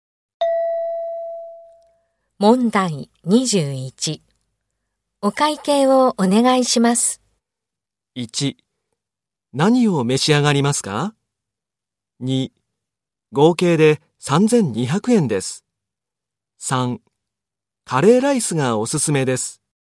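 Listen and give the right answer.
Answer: 2: 合計で3200円です。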